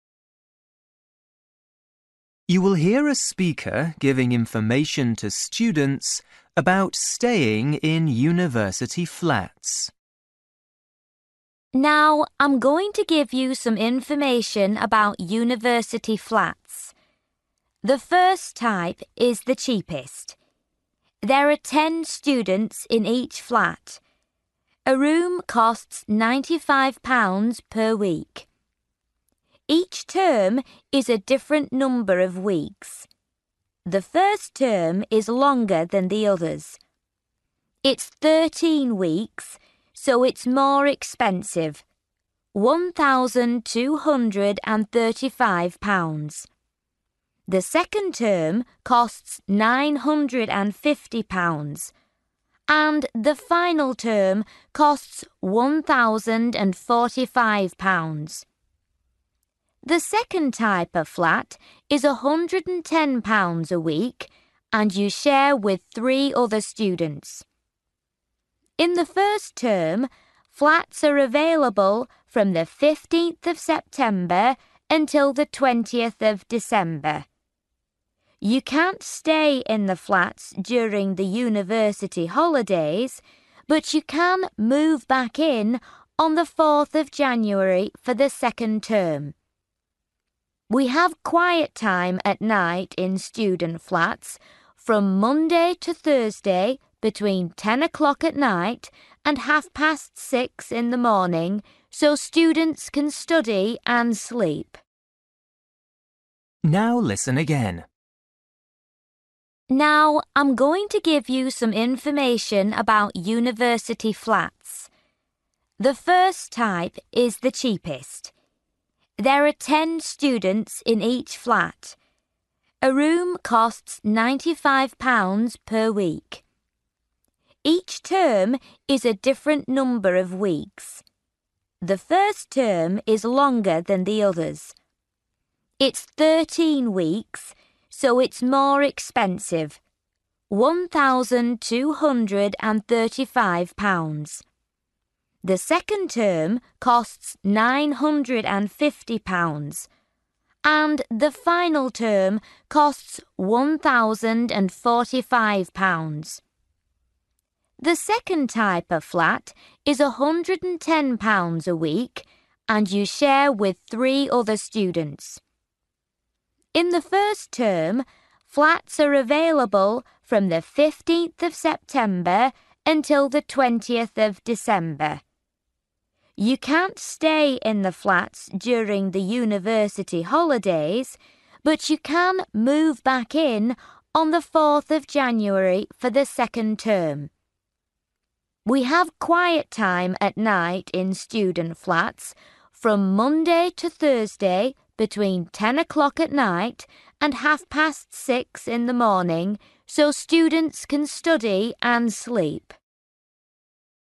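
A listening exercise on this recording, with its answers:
For each question, write the correct answer in the gap. Write one word or a number or a date or a time.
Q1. Longest term: (1) weeks long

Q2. Price of type 1 flat for final term: (2) £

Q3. Number of students sharing type 2 flat: (3)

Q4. Term 1 dates for flats: (4) September – 20 December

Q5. Students must be (5) after 10 p.m.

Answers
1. 13
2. 1,045
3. 4
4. 15
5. quiet

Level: Luyện nghe trình độ A2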